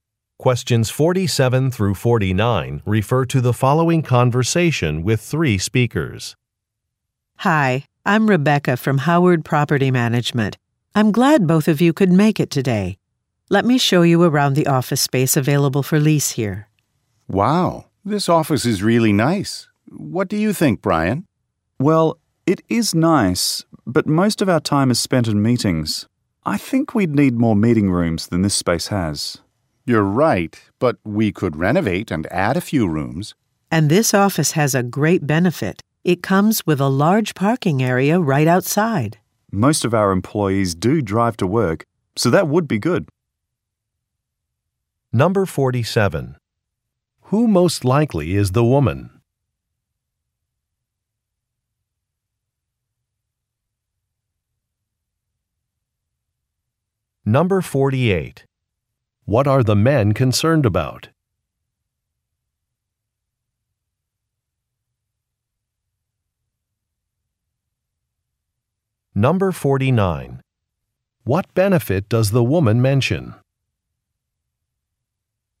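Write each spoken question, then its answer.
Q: Who most likely is the woman?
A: A property manager

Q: What are the men concerned about?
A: Not enough meeting rooms

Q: What benefit does the woman mention?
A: A large parking area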